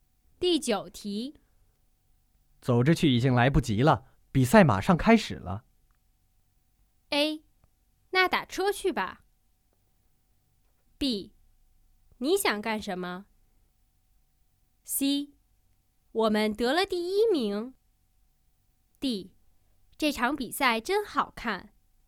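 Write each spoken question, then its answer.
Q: 走着去已经来不及了,比赛马上开始了。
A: A: 那打车去吧。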